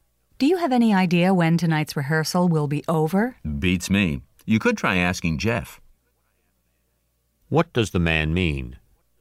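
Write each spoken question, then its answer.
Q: What does the man mean?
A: He doesn't know when the rehearsal will end; Jeff might know.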